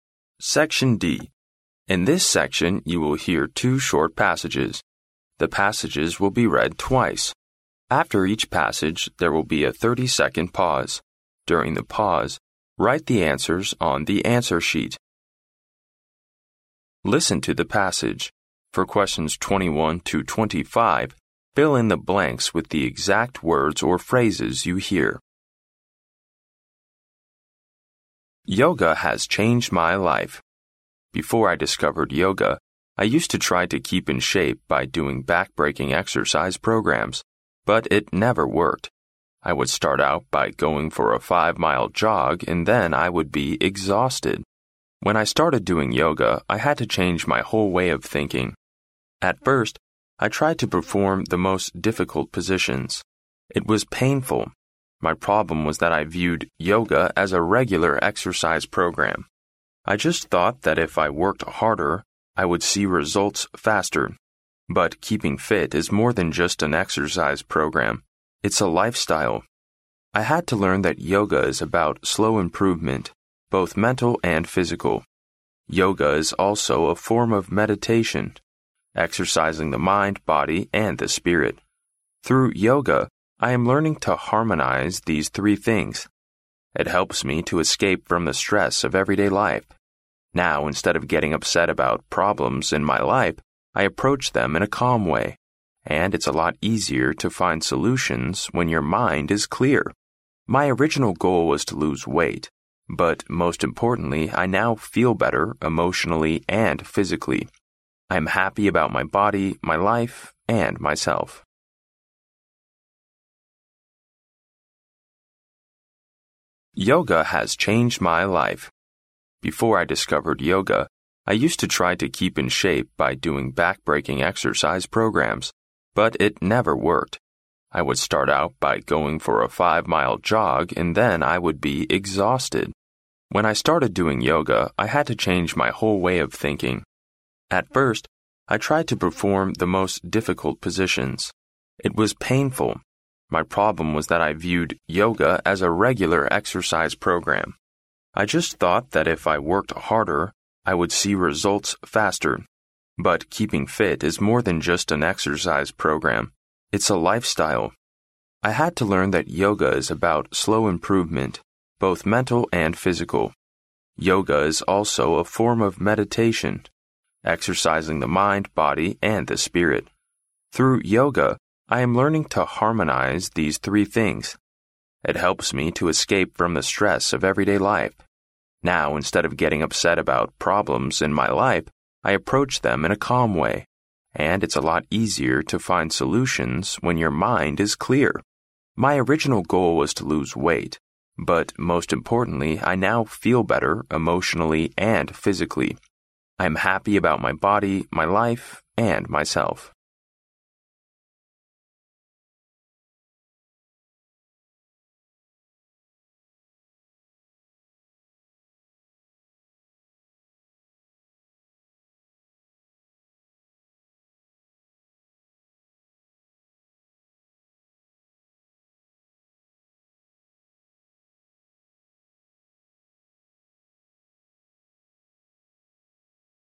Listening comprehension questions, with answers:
Listen to the passage. For questions 21—25, fill in the blanks with the exact words or phrases you hear.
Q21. I would start out by going for a five-mile jog, and then I would (21)_____.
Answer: be exhausted

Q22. I had to learn that yoga is about (22)_____, both mental and physical.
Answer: slow improvement

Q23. It helps me to (23)_____ the stress of everyday life.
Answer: escape from

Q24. And it's a lot easier to (24)_____ when your mind is clear!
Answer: find solutions

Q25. But most importantly, I now feel better, (25)_____.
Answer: emotionally and physically

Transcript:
In this section, you will hear two short passages. The passages will be read only twice. After each passage, there will be a thirty-second pause. During the pause, write the answers on the answer sheet.
Listen to the passage. For questions 21—25, fill in the blanks with the exact words or phrases you hear.
Yoga has changed my life! Before I discovered yoga, I used to try to keep in shape by doing backbreaking exercise programs. But it never worked. I would start out by going for a five-mile jog, and then I would be exhausted.
When I started doing yoga I had to change my whole way of thinking. At first, I tried to perform the most difficult positions. It was painful. My problem was that I viewed yoga as a regular exercise program. I just thought that if I worked harder, I would see results faster. But keeping fit is more than just an exercise program; it's a life style. I had to learn that yoga is about slow improvement, both mental and physical.
Yoga is also a form of meditation, exercising the mind, body, and the spirit. Through yoga, I am learning to harmonize these three things. It helps me to escape from the stress of everyday life. Now, instead of getting upset about problems in my life, I approach them in a calm way. And it's a lot easier to find solutions when your mind is clear!
My original goal was to lose weight. But most importantly, I now feel better, emotionally and physically. I am happy about my body, my life, and myself.